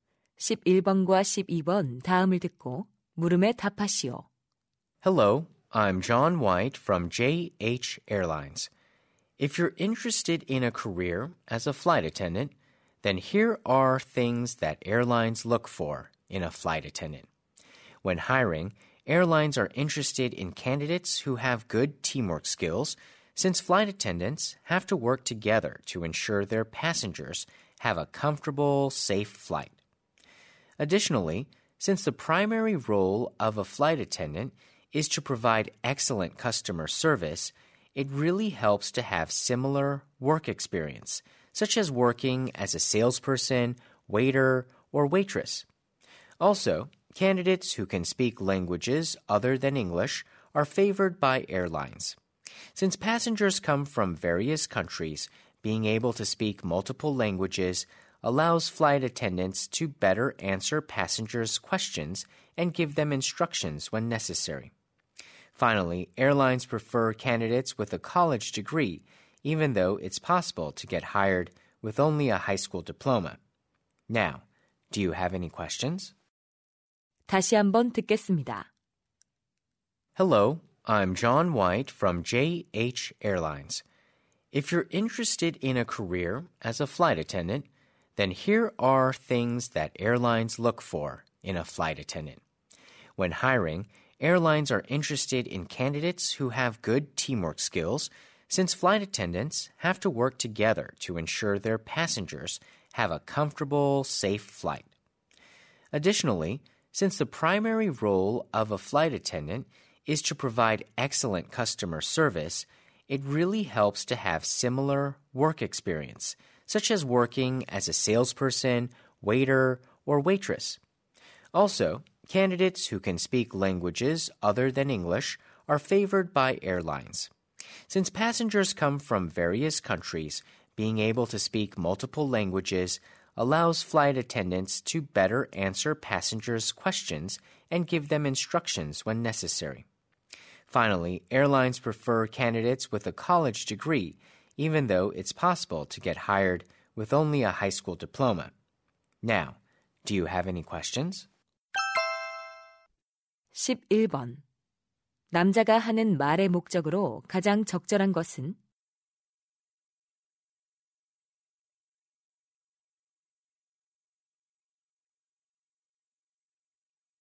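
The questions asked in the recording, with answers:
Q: 남자가 하는 말의 목적으로 가장 적절한 것은?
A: 항공사가 승무원 채용 시 중시하는 자격 요건을 안내하려고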